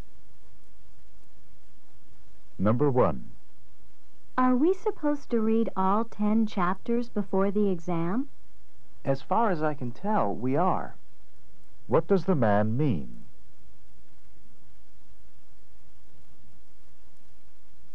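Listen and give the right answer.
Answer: He thinks they have to read all ten chapters but isn't certain.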